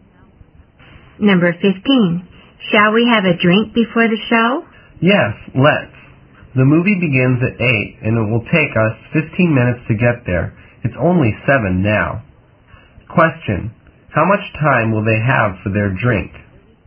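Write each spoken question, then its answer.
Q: How much time will they have for their drink?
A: 45 minutes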